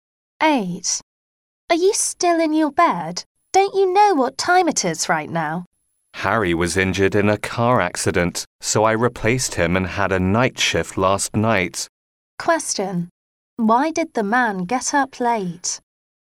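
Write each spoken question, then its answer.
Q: Why did the man get up late?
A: He worked a night shift in Harry's place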